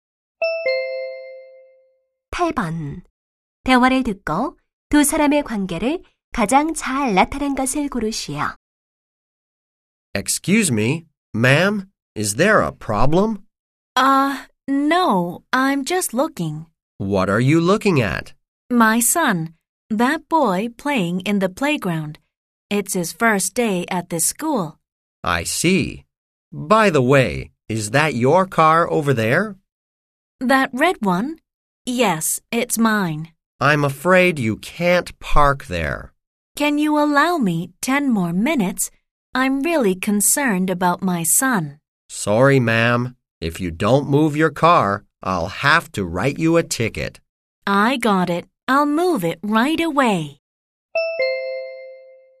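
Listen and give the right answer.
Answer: 주차 단속원(경찰) - 운전자(학부모)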